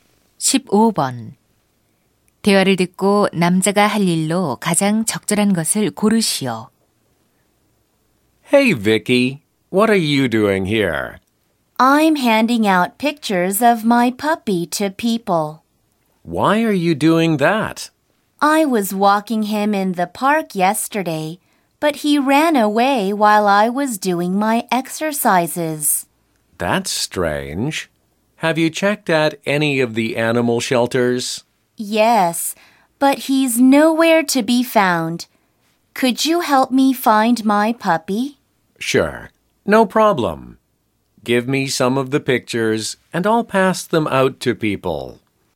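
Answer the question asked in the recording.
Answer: 강아지 사진 나눠 주기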